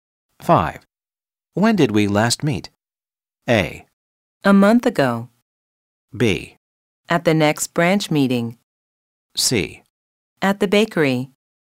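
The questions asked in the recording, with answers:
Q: When did we last meet?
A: A: A month ago.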